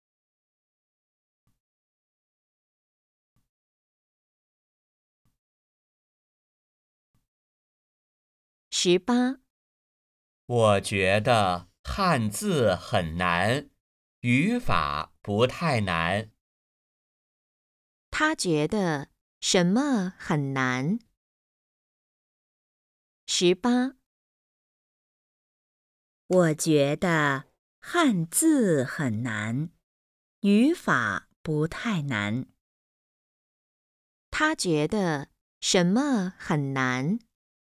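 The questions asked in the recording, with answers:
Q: 他觉得什么很难?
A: 汉字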